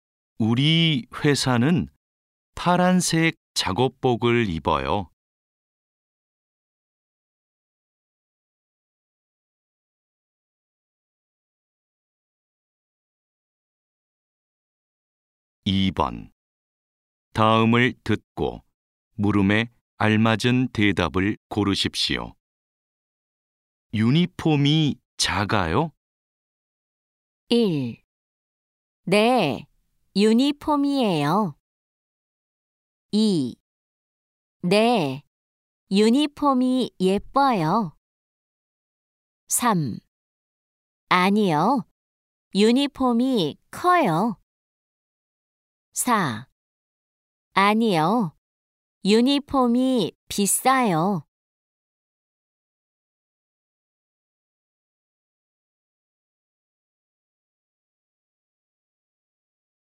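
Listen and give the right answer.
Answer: 3: 아니요, 유니폼이 커요.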